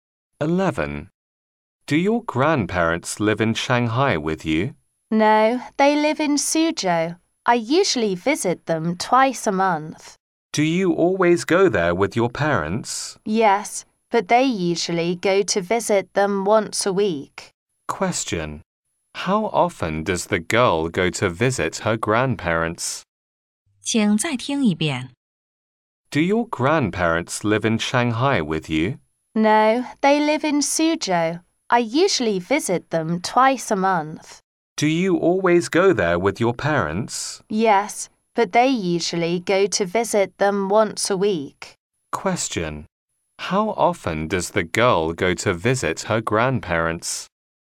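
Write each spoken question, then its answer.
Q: How often does the girl go to visit her grandparents?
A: Twice a month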